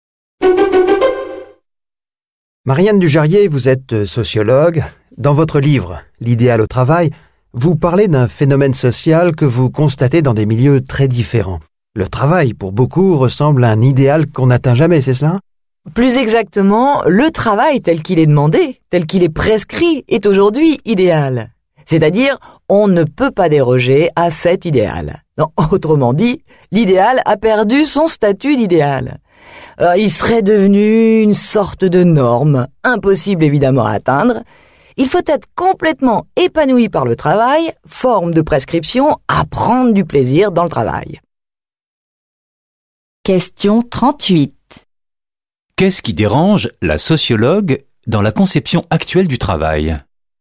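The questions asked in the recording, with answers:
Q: Qu'est-ce qui dérange la sociologue dans la conception actuelle du travail ?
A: L'idéal est devenu une norme obligatoire impossible à atteindre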